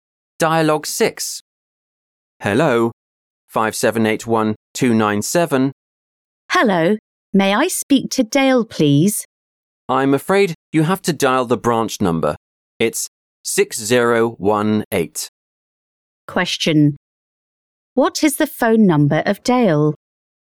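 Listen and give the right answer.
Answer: 5781297, extension 6018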